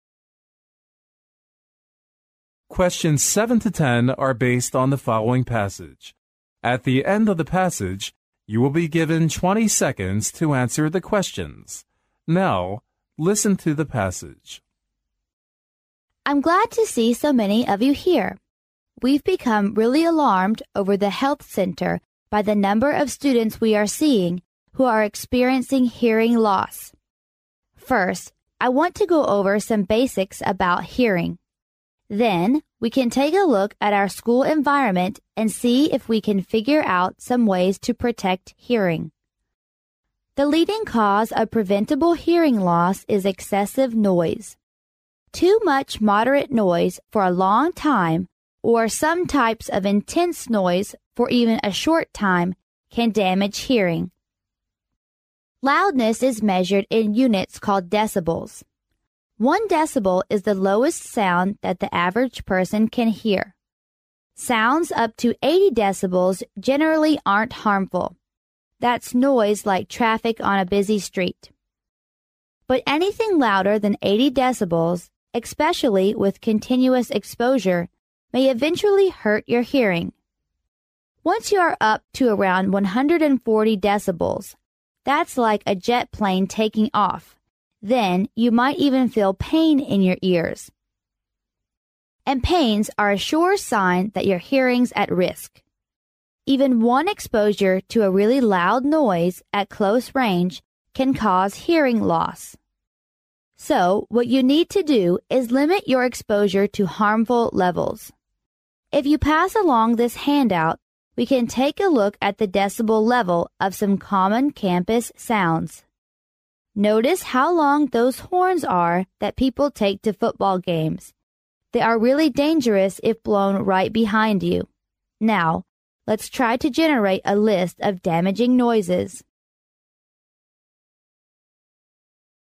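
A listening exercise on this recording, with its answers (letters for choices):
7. After going over some basic about hearing, the teacher will lead the students to_____.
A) put the theory learned into practice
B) finish and check their homework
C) solve some academic problems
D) cure people who are experiencing hearing loss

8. All the following can damage hearing EXCEPT______.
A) excessive noise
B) too much moderate noise for a long time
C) intense noise for even a short time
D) moderate noise for a short time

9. Generally,it isn't harmful to our ears,when sounds are up to_____.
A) 140 decibels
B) 100 decibels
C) 80 decibels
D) 60 decibels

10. Once you are up to around 140 decibels' you will_____.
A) suffer from hearing loss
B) feel pain in your ears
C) feel normal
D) faint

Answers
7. A
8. D
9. C
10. B

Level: 专业四级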